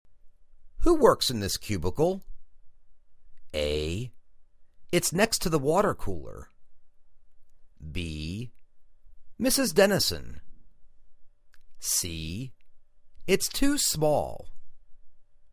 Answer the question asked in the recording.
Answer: Mrs. Dennison